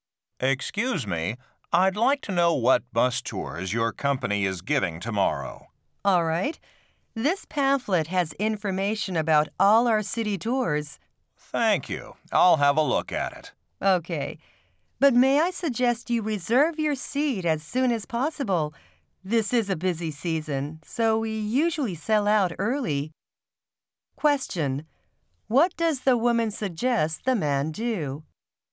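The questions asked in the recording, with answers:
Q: What does the woman suggest the man do?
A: Reserve his seat on a tour as soon as possible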